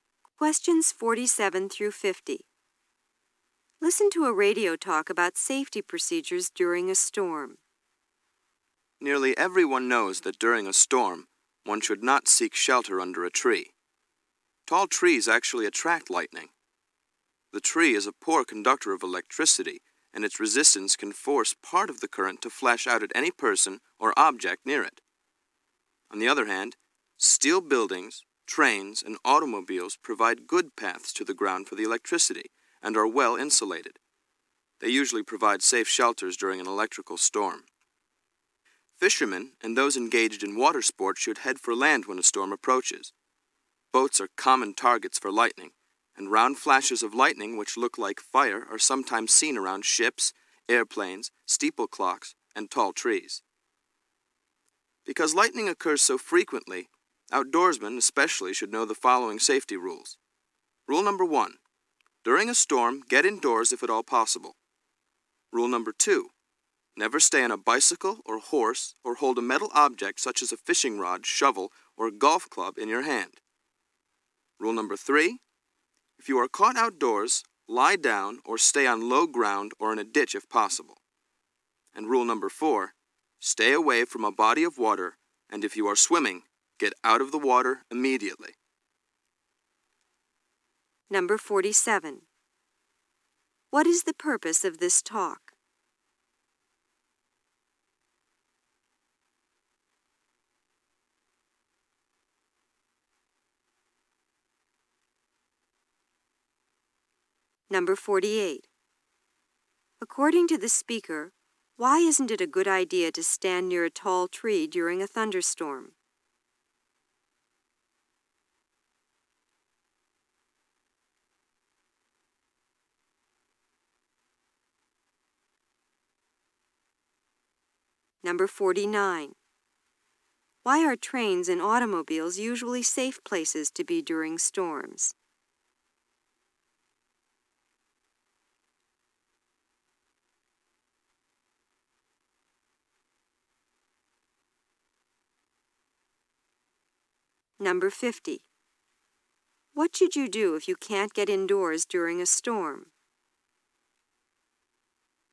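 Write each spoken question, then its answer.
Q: What is the purpose of this talk?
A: To explain safety rules during a storm

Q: According to the speaker, why isn't it a good idea to stand near a tall tree during a thunderstorm?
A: Trees attract lightning and the current can flash out at people near them

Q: Why are trains and automobiles usually safe places to be during storms?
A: They give good paths to the ground and are well insulated

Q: What should you do if you can't get indoors during a storm?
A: Lie down or stay on low ground or in a ditch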